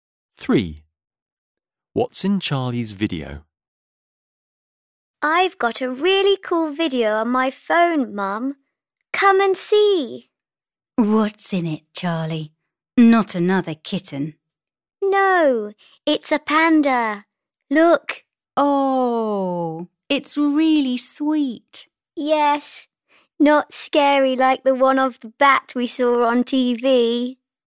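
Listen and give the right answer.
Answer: A panda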